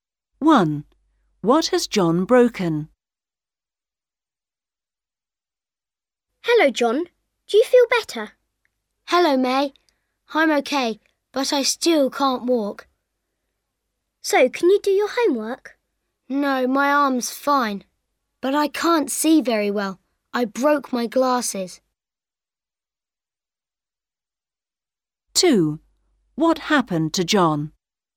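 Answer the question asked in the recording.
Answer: His glasses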